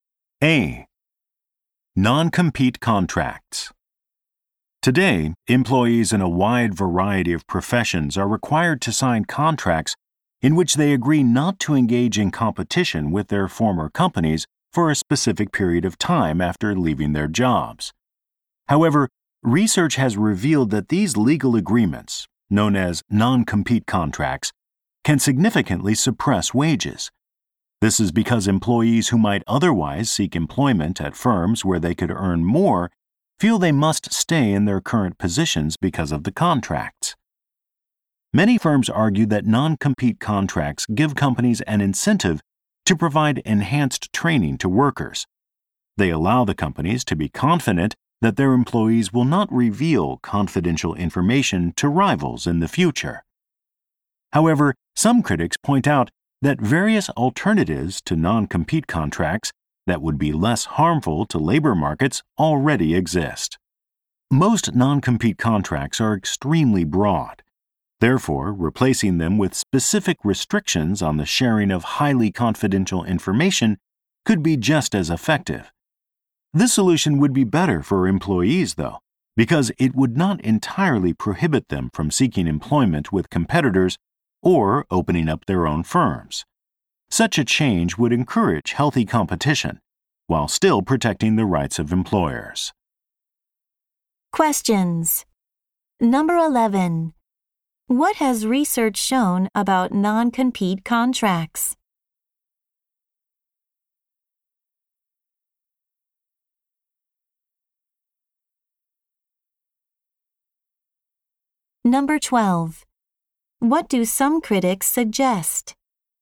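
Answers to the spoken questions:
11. They can keep wages low by discouraging workers from moving to better-paying jobs.
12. Replacing them with specific restrictions on sharing highly confidential information.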